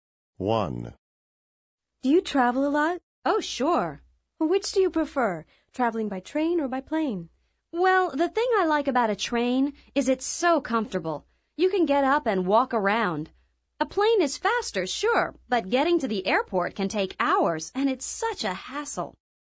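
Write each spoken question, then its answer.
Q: Which do you prefer, traveling by train or by plane?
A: By train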